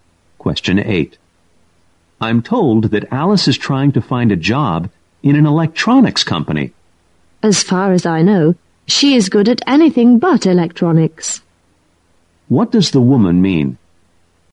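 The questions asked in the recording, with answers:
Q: What does the woman mean?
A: Alice is not good at electronics.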